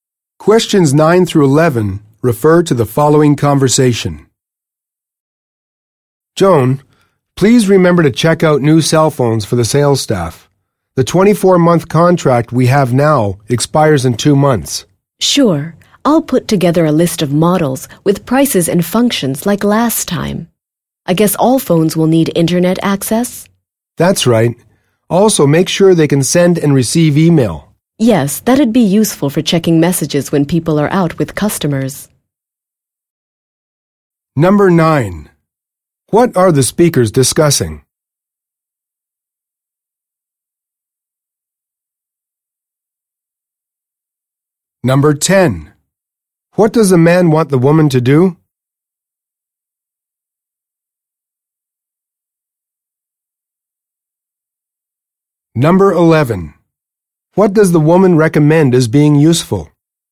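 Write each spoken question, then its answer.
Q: What are the speakers discussing?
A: New cell phones for the sales staff

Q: What does the man want the woman to do?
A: Check out new cell phones for the sales staff

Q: What does the woman recommend as being useful?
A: Email on the phones, for checking messages when out with customers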